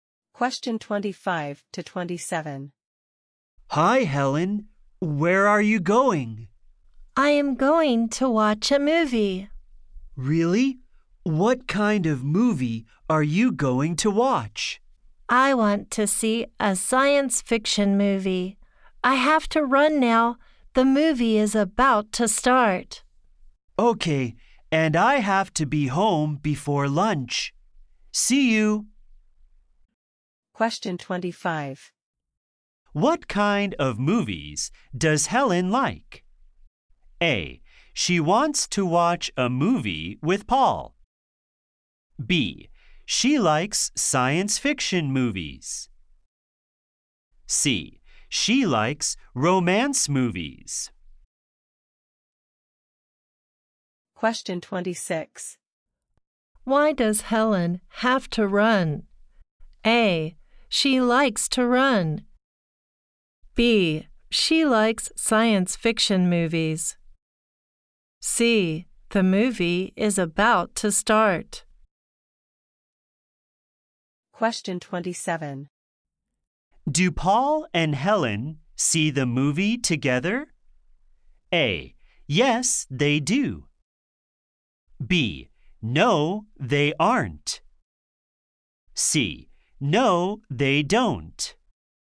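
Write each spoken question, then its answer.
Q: What kind of movies does Helen like?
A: B: She likes science fiction movies.

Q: Why does Helen have to run?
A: C: The movie is about to start.

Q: Do Paul and Helen see the movie together?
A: C: No, they don't.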